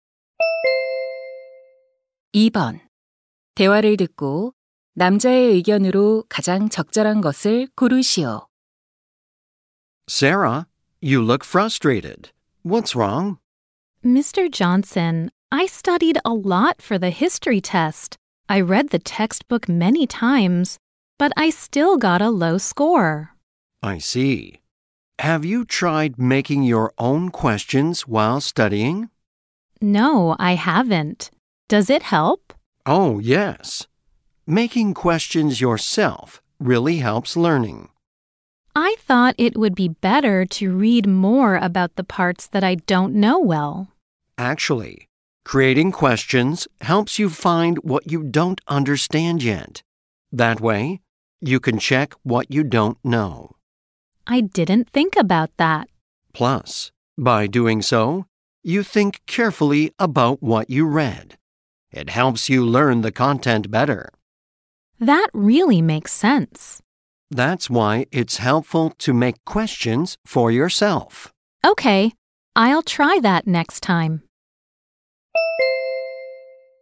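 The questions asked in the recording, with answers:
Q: 대화를 듣고 남자의 의견으로 가장 적절한 것을 고르시오.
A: 공부할 때 스스로 질문을 만드는 것이 학습에 도움이 된다.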